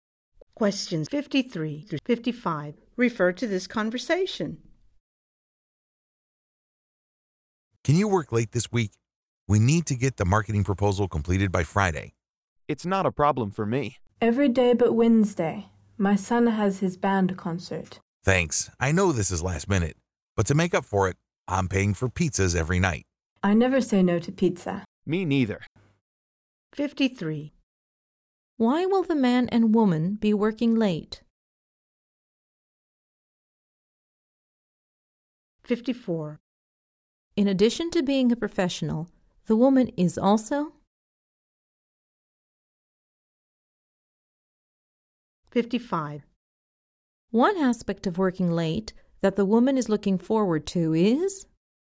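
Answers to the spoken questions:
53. To finish the marketing proposal by Friday
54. A mother
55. Free pizza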